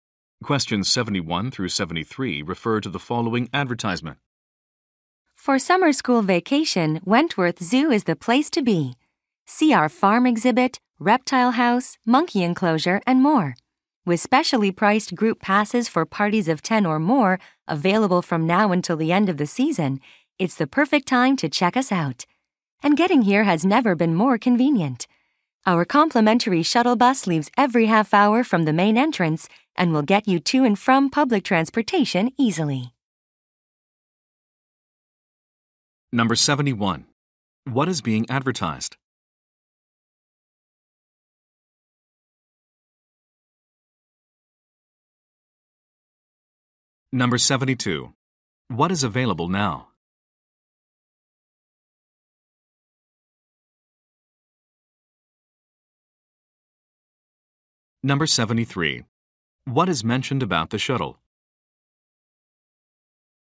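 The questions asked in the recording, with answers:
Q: What is being advertised?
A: A zoo (Wentworth Zoo)

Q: What is available now?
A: Discounted group passes

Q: What is mentioned about the shuttle?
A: It is free and runs every half hour to public transportation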